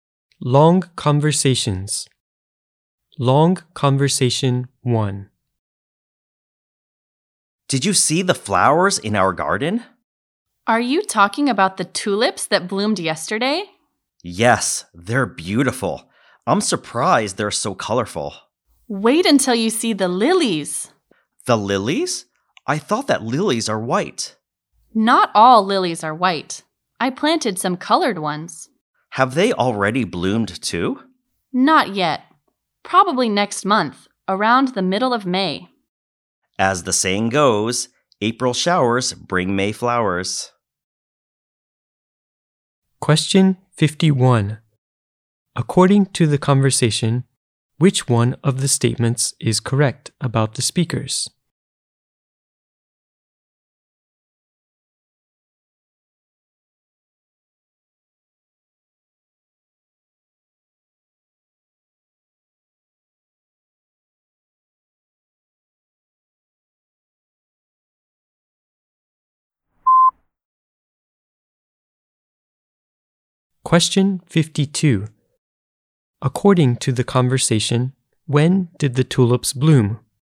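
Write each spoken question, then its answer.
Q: According to the conversation, when did the tulips bloom?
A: Yesterday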